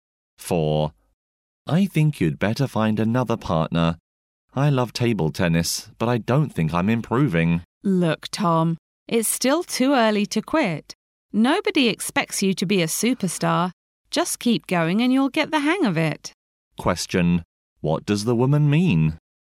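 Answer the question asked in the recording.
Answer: Tom shouldn't quit; he should keep practicing table tennis.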